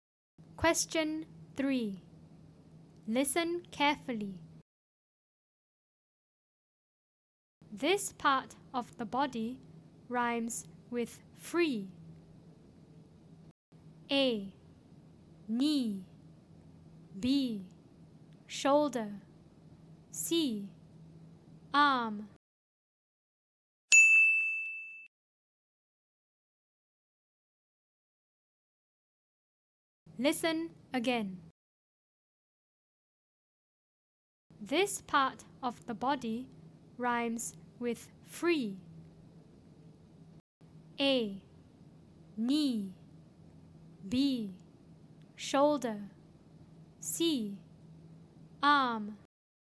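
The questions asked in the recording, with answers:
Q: This part of the body rhymes with free.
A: A: Knee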